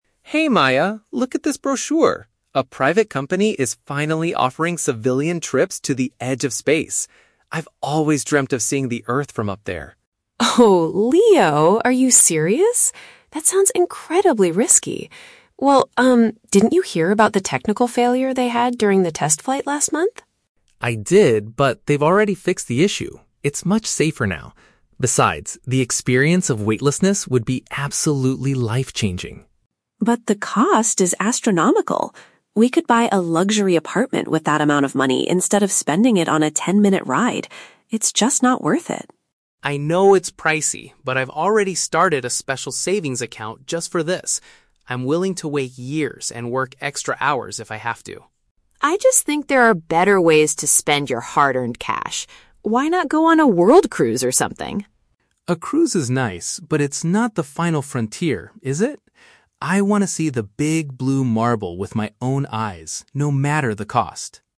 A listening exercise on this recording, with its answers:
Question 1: Why is the woman concerned about the space trip?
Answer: She is worried about the safety and the high price.

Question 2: What is the man's main motivation for going to space?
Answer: To experience the feeling of zero gravity.

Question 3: How does the man plan to pay for the ticket?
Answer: By putting aside money in a dedicated account.

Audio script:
Man (Leo): Hey Maya, look at this brochure! A private company is finally offering civilian trips to the edge of space. I've always dreamt of seeing the Earth from up there.
Woman (Maya): Oh, Leo, are you serious? That sounds incredibly risky. Well, um, didn't you hear about the technical failure they had during the test flight last month?
Man (Leo): I did, but they've already fixed the issue. It's much safer now. Besides, the experience of weightlessness would be absolutely life-changing.
Woman (Maya): But the cost is astronomical! We could buy a luxury apartment with that amount of money instead of spending it on a ten-minute ride. It's just not worth it.
Man (Leo): I know it's pricey, but I've already started a special savings account just for this. I'm willing to wait years and work extra hours if I have to.
Woman (Maya): I just think there are better ways to spend your hard-earned cash. Why not go on a world cruise or something?
Man (Leo): A cruise is nice, but it's not the "final frontier," is it? I want to see the "Big Blue Marble" with my own eyes, no matter the cost.